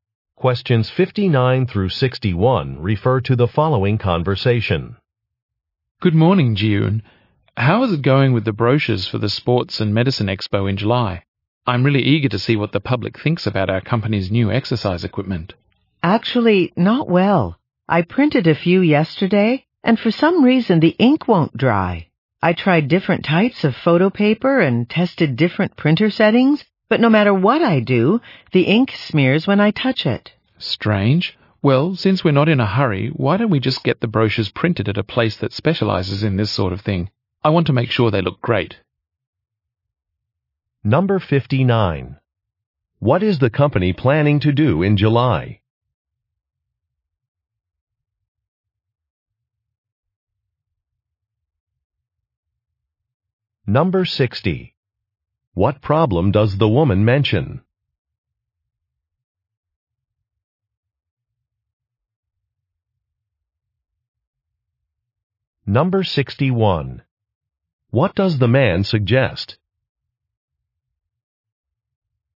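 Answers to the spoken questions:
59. Attend an expo
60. The ink smears
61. Using a professional printer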